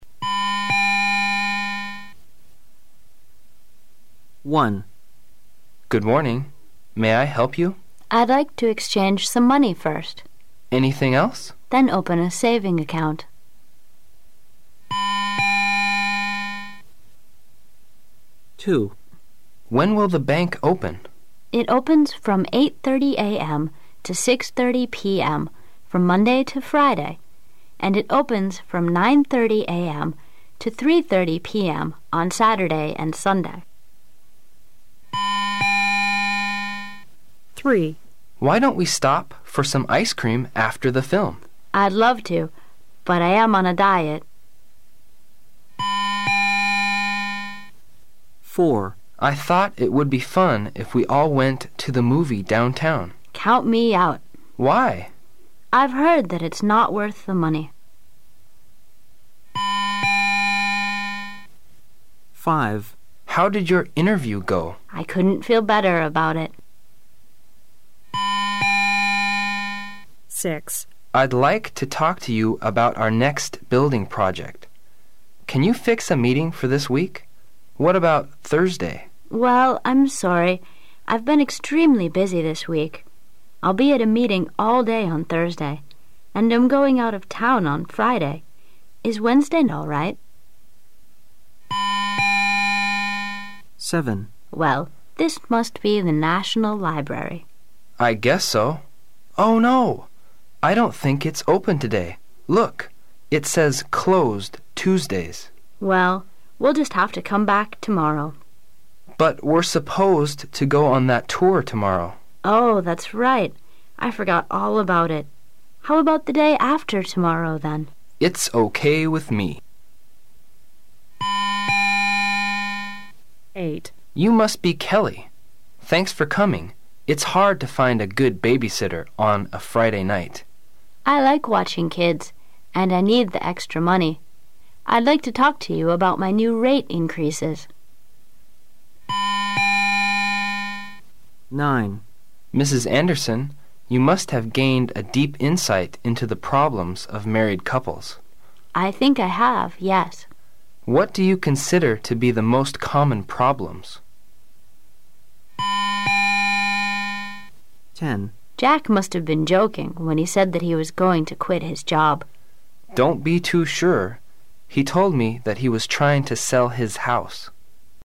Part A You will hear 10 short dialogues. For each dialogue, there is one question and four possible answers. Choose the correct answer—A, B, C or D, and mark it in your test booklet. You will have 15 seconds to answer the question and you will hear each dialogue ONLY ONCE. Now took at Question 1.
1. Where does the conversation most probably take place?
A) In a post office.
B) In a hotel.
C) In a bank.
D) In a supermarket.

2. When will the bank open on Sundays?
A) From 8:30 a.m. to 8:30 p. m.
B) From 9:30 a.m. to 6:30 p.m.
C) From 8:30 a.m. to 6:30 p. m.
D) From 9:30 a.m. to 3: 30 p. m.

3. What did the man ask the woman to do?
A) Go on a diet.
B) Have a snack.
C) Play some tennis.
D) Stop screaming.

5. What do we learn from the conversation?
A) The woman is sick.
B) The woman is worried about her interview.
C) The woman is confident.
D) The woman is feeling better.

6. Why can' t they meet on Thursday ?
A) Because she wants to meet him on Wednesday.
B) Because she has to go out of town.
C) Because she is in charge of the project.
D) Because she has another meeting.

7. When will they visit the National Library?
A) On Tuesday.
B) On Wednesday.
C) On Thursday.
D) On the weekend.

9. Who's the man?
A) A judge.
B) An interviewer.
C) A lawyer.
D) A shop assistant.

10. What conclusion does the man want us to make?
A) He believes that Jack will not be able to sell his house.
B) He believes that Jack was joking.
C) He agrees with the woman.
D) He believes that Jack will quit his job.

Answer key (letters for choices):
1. C
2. D
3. B
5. C
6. D
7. C
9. B
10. D

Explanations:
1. M: Good morning. May I help you? W: I' d like to exchange some money first. M: Anything else? W: Then open a saving account.
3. M: Why don't we stop for some ice-cream after the film? W: I'd love to, but I am on a diet.
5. M: How did your interview go? W: I couldn' t feel better about it.
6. M: I'd like to talk to you about our next building project. Can you fix meeting for this week? What about Thursday? W: Well, I'm sorry. I' ve been extremely busy this week. I' II be at meeting all day on Thursday. And I' m going out of town on Friday. I Wednesday all right?
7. W: Well, this must be the National Library. M: I guess so. Oh no! I don't think it's open today. Look. It says "Closed Tuesdays". W: Well, we'll just have to come back tomorrow. M: But we're supposed to go on that tour tomorrow. W: Oh,that's right. I forgot all about it. How about the day after tomorrow then? M: It's OK with me.
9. M: Mrs. Anderson, you must have gained a deep insight into the problems of married couples. W: I think I have, yes. M: What do you consider to be the most common problems?